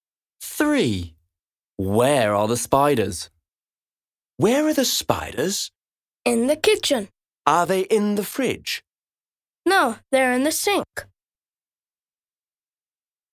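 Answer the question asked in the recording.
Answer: In the sink (in the kitchen)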